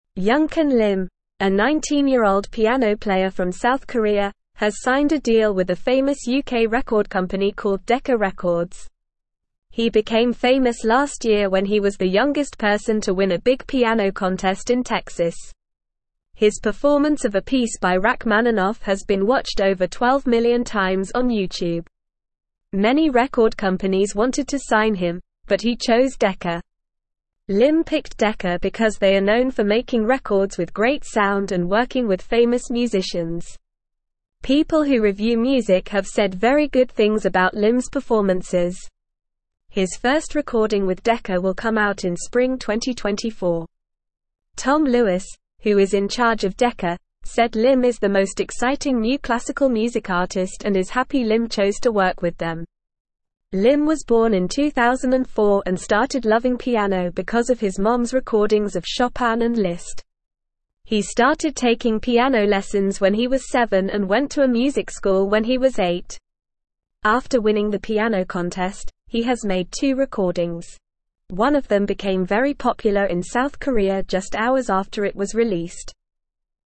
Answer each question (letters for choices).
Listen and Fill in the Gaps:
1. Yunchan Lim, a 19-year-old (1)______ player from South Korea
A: piano

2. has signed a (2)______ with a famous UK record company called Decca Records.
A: deal

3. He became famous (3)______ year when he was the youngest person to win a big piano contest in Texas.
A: last

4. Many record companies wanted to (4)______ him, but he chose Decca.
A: sign

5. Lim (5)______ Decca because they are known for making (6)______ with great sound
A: picked

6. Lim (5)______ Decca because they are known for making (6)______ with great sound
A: records

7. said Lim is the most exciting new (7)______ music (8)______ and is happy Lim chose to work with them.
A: classical

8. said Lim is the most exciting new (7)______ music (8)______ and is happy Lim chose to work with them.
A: artist

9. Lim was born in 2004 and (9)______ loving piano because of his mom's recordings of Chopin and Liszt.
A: started

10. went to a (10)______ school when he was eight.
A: music

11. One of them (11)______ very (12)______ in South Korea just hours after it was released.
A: became

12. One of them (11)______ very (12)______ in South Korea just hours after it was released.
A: popular

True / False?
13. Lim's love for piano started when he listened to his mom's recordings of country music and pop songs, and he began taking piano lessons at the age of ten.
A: False

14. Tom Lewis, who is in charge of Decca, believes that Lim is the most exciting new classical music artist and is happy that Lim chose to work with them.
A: True

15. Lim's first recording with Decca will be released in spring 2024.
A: True

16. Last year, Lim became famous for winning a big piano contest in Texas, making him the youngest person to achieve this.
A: True

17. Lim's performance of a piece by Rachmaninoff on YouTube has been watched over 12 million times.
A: True

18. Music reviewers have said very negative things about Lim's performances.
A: False

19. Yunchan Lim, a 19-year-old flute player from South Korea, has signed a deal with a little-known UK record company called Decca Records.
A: False

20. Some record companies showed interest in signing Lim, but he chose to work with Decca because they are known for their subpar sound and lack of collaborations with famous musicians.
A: False

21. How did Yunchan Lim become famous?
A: Yunchan Lim became famous after winning a big piano contest in Texas and his performance of a piece by Rachmaninoff went viral on YouTube.

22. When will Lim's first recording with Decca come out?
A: Lim's first recording with Decca will come out in spring 2024.

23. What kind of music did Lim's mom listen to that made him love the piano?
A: Lim's mom listened to recordings of Chopin and Liszt, which made him love the piano.

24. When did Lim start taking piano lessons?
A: Lim started taking piano lessons when he was seven years old.

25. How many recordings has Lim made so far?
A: Lim has made two recordings so far.

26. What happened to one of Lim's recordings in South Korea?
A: One of Lim's recordings became very popular in South Korea just hours after it was released.

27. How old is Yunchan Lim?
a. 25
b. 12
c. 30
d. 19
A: d

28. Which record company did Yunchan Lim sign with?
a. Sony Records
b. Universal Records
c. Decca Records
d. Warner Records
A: c

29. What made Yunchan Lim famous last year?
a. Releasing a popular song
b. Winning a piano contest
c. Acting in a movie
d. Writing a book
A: b

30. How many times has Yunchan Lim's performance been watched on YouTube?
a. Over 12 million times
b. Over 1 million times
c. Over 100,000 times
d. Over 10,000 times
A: a

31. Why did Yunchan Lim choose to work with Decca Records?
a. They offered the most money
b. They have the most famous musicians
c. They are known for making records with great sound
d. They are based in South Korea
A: c

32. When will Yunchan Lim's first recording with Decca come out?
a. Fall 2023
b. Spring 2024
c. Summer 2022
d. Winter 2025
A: b

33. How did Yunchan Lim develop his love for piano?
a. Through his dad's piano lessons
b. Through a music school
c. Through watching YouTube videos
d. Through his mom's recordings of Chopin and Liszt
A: d

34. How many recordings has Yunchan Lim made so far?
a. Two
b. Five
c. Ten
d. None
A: a

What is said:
Yunchan Lim, a 19-year-old piano player from South Korea, has signed a deal with a famous UK record company called Decca Records. He became famous last year when he was the youngest person to win a big piano contest in Texas. His performance of a piece by Rachmaninoff has been watched over 12 million times on YouTube. Many record companies wanted to sign him, but he chose Decca.
Lim picked Decca because they are known for making records with great sound and working with famous musicians. People who review music have said very good things about Lim's performances. His first recording with Decca will come out in spring 2024. Tom Lewis, who is in charge of Decca, said Lim is the most exciting new classical music artist and is happy Lim chose to work with them.
Lim was born in 2004 and started loving piano because of his mom's recordings of Chopin and Liszt. He started taking piano lessons when he was seven and went to a music school when he was eight. After winning the piano contest, he has made two recordings. One of them became very popular in South Korea just hours after it was released.

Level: Level 2